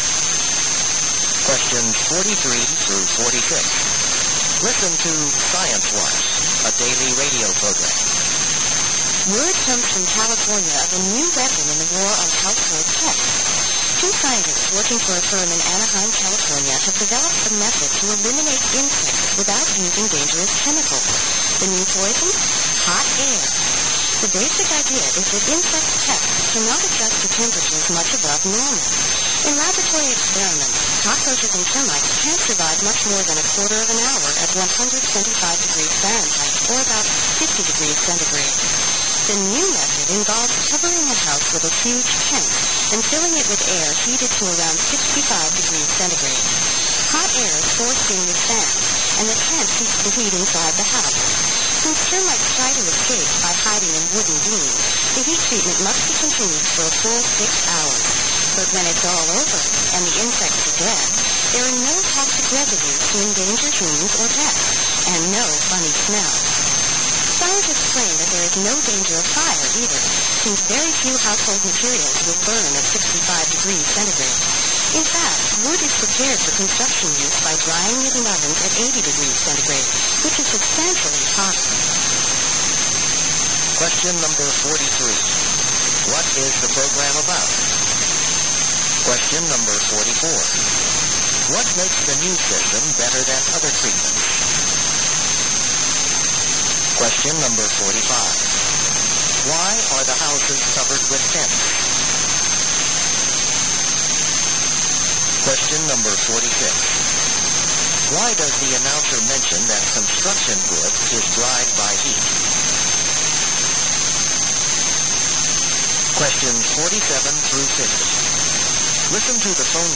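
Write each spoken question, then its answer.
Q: What is the program about?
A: A new way to kill household insects with hot air

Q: What makes the new system better than other treatments?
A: It uses no dangerous chemicals and leaves no toxic residue

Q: Why are the houses covered with tents?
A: To keep the hot air in the house

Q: Why does the announcer mention that construction wood is dried by heat?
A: To show that the treatment does not cause a fire risk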